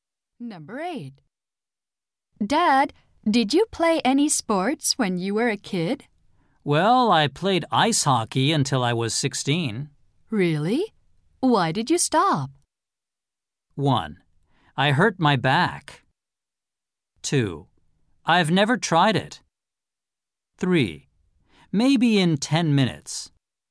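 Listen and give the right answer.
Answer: 1: I hurt my back.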